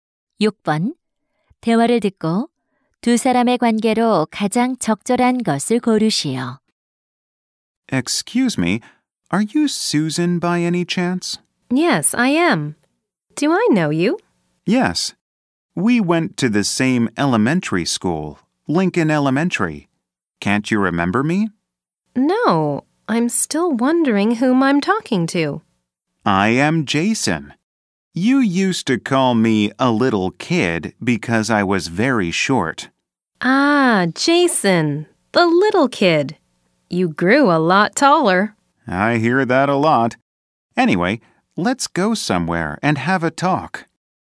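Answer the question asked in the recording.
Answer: 초등학교 동창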